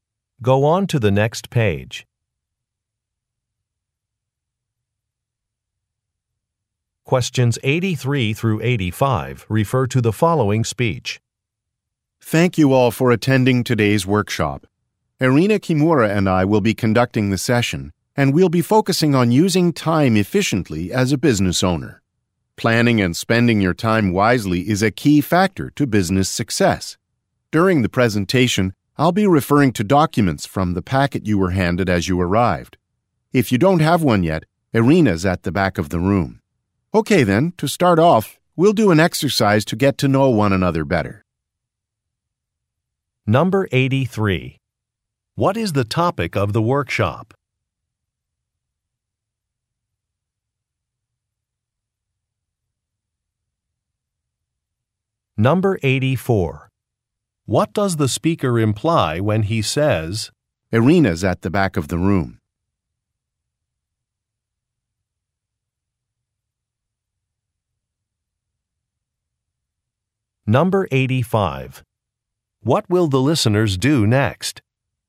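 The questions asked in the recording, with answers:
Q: What is the topic of the workshop?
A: Using time efficiently as a business owner

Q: What does the speaker imply when he says, Irina's at the back of the room?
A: Listeners without a packet can get one from Irina

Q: What will the listeners do next?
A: Do an exercise to get to know one another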